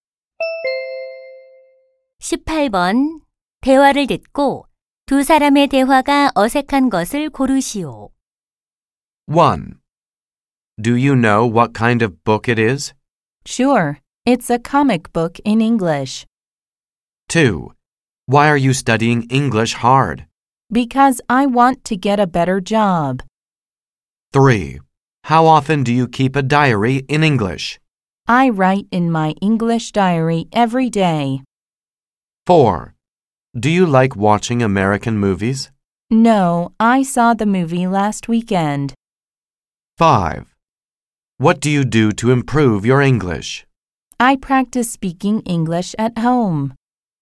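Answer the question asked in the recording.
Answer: 4: Do you like watching American movies? / No, I saw the movie last weekend.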